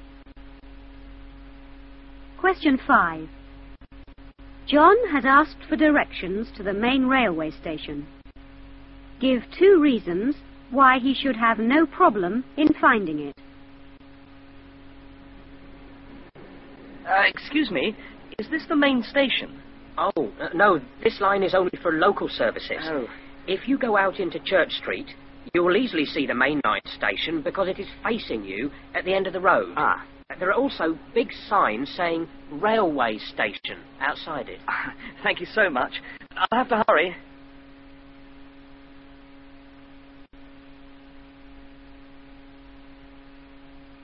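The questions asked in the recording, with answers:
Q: Give 2 reasons why he should have no problem in finding it.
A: It faces you at the end of Church Street; there are big Railway Station signs outside it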